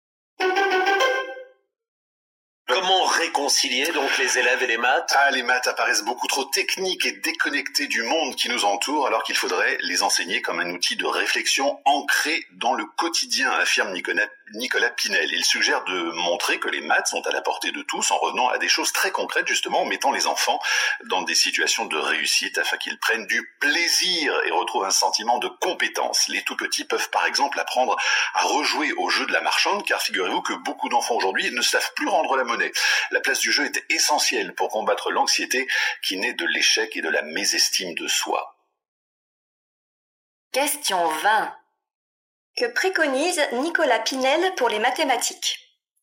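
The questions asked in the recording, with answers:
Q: Que préconise Nicolas Pinel pour les mathématiques?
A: Les enseigner de façon concrète, liée au quotidien, par le jeu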